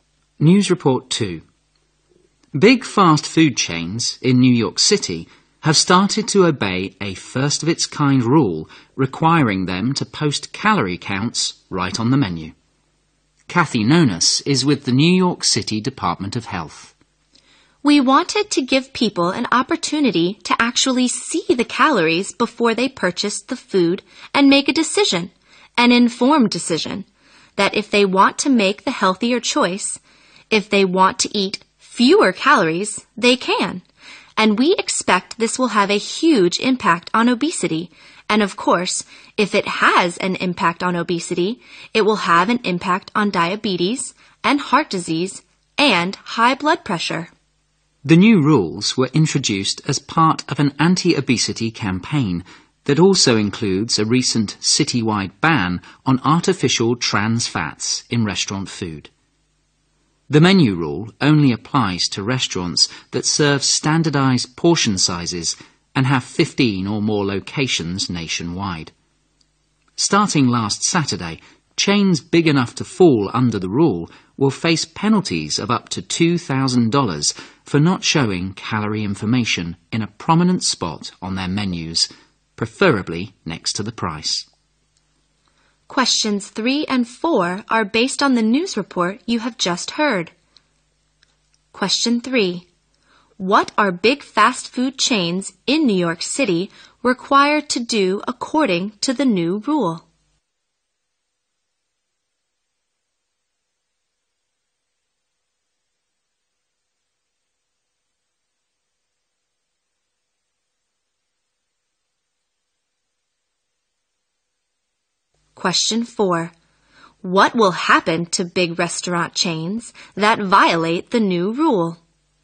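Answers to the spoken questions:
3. Post calorie counts on their menus.
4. They will face penalties of up to $2,000.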